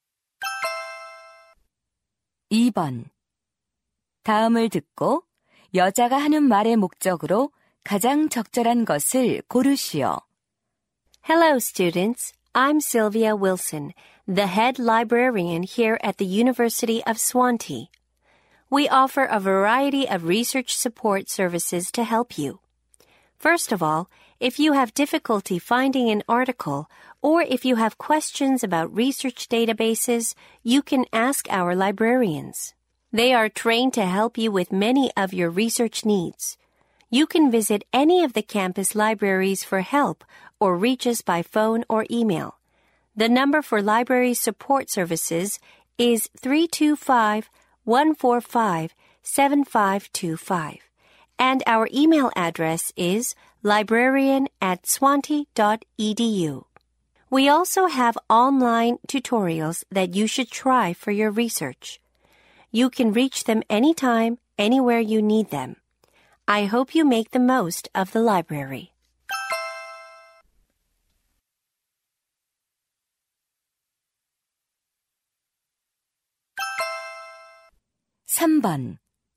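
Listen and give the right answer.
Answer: 도서관의 연구 지원 서비스를 안내하려고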